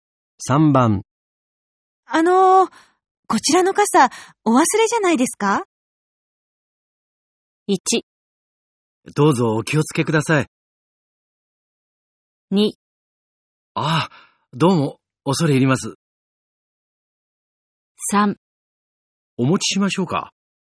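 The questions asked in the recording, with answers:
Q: こちらの傘、お忘れじゃないですか?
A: 2: ああ、どうも、恐れ入ります。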